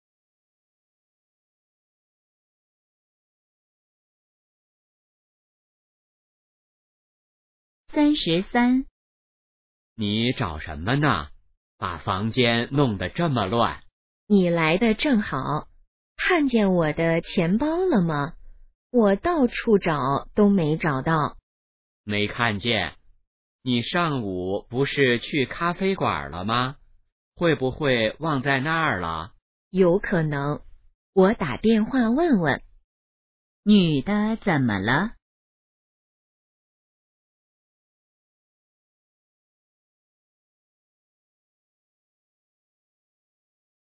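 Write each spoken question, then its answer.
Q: 女的怎么了?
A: 钱包找不到了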